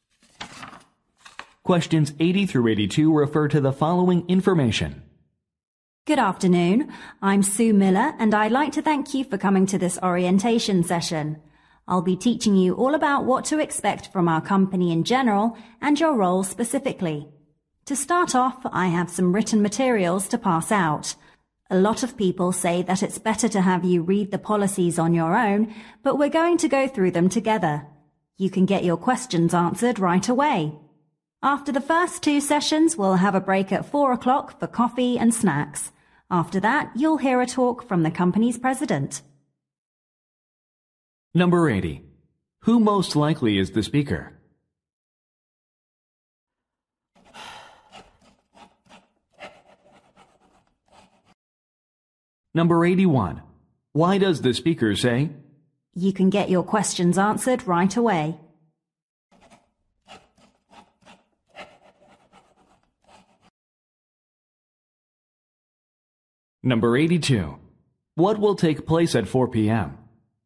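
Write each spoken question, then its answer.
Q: Who most likely is the speaker?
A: A trainer leading a new employee orientation

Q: Why does the speaker say?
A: To explain why they will go through the policies together

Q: What will take place at 4 p.m.?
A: A coffee and snack break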